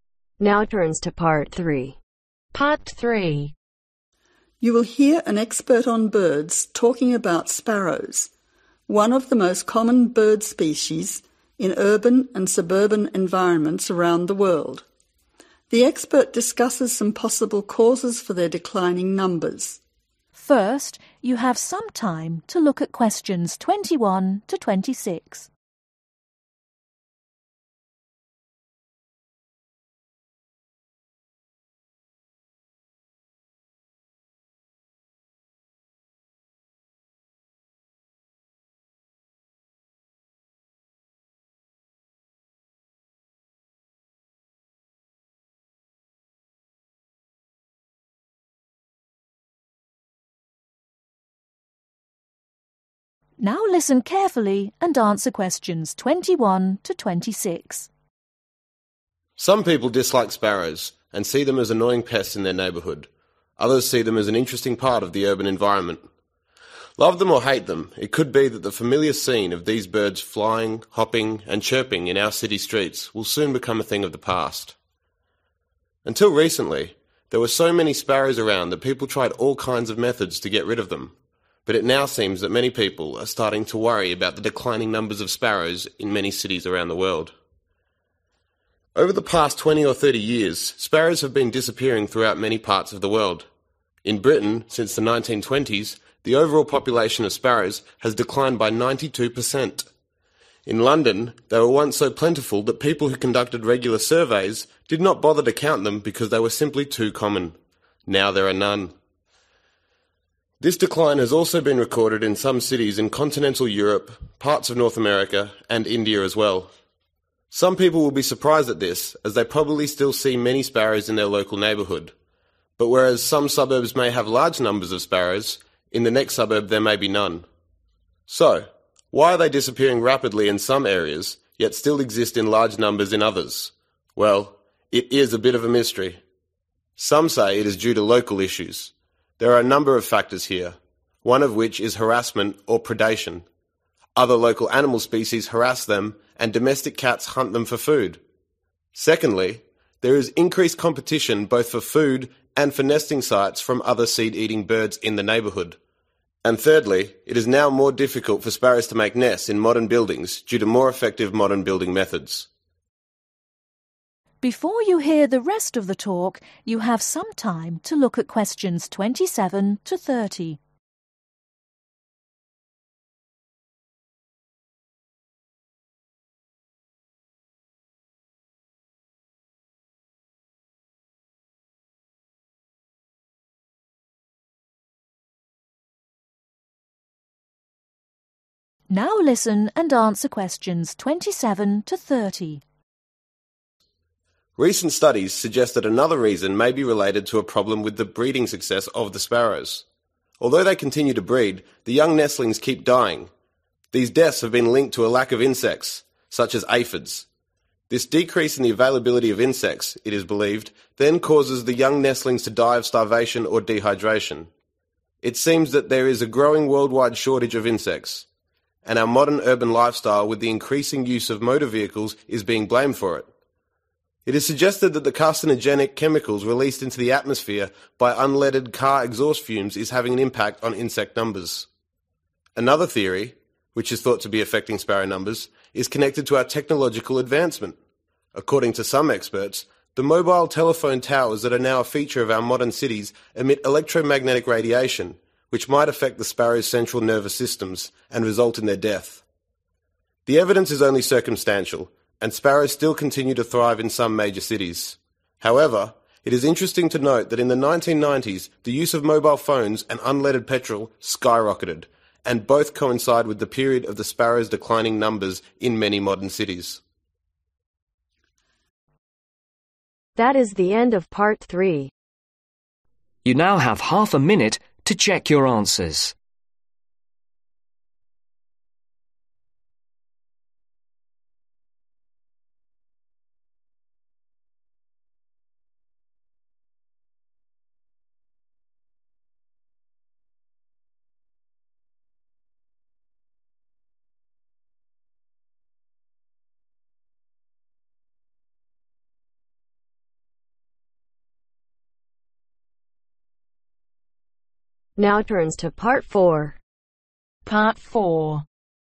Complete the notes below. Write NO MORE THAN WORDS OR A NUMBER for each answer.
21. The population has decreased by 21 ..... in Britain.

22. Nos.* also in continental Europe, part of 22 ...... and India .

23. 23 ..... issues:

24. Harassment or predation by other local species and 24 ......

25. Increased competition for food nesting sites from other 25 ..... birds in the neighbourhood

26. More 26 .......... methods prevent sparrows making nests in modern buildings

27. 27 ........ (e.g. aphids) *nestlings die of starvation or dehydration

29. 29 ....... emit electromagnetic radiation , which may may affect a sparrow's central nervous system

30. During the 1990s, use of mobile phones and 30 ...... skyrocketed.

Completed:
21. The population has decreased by 92% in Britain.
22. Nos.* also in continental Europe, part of North America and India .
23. Local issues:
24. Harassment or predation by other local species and Domestic cats
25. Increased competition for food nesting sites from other Seed-eating birds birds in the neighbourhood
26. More Effective building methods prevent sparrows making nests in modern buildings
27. Lack of insects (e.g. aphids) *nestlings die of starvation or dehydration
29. Mobile telephone towers/ mobile phone towers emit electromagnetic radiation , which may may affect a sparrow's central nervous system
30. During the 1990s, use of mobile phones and Unleaded Petrol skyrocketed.